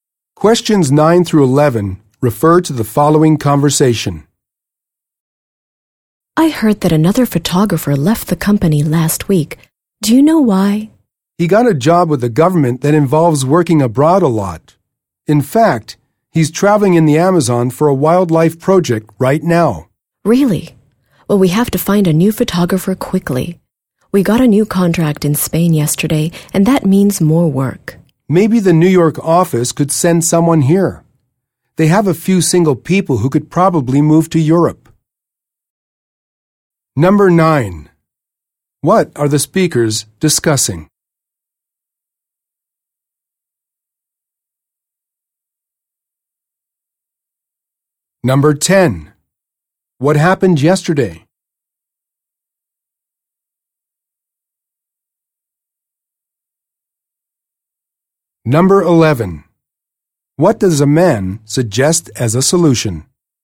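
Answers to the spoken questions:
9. A photographer who left and the need to find a new one
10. They got a new contract in Spain
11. Having the New York office send someone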